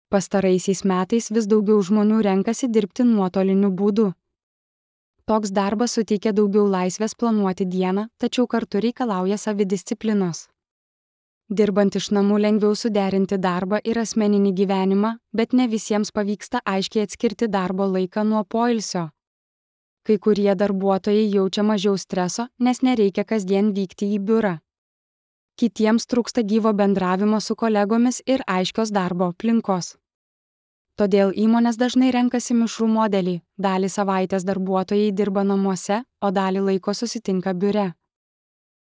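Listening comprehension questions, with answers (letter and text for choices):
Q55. Apie ką kalbama įraše?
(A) Apie nuotolinį darbą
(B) Apie keliones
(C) Apie sveikatos paslaugas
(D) Apie mokymosi metodus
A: (A) Apie nuotolinį darbą

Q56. Ko reikia dirbant nuotoliniu būdu?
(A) Savidisciplinos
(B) Naujo biuro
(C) Daugiau komandiruočių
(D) Trumpesnės savaitės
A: (A) Savidisciplinos

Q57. Kokį modelį dažnai renkasi įmonės?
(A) Tik darbą biure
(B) Mišrų darbo modelį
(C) Tik darbą savaitgaliais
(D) Trumpalaikes sutartis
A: (B) Mišrų darbo modelį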